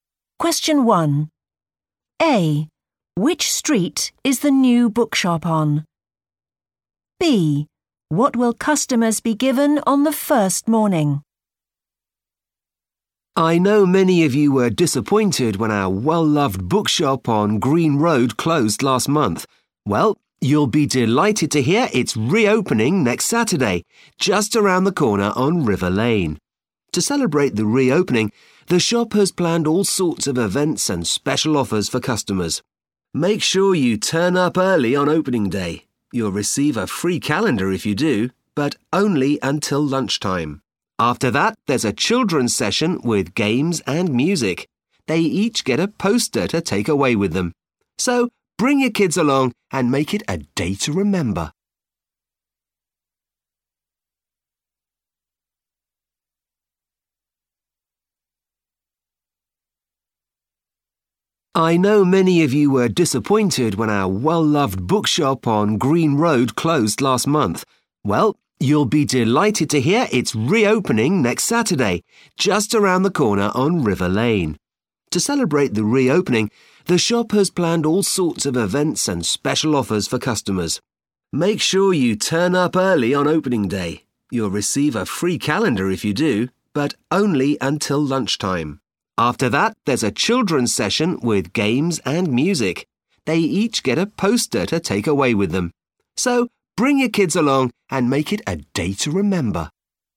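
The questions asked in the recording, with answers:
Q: Which street is the new bookshop on?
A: River Lane

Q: What will customers be given on the first morning?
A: a free calendar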